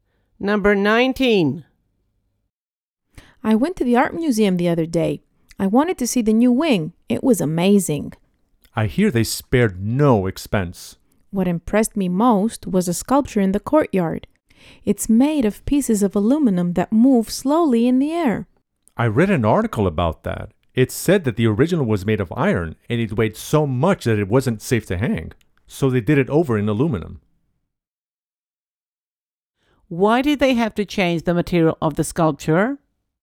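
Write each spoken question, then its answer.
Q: Why did they have to change the material of the sculpture?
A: The iron original was too heavy to hang safely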